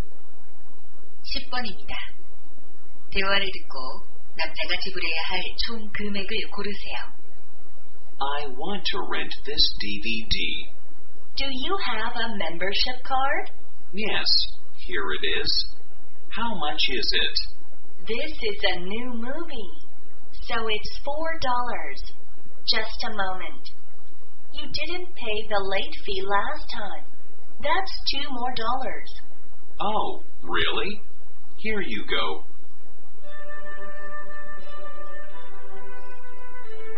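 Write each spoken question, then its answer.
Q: 대화를 듣고 남자가 지불해야 할 총 금액을 고르세요.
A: 6달러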